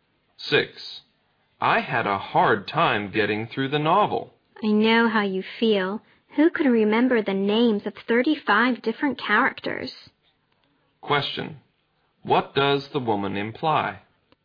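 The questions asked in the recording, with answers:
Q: Question. What does the woman imply?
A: The novel was hard to follow because it had too many characters.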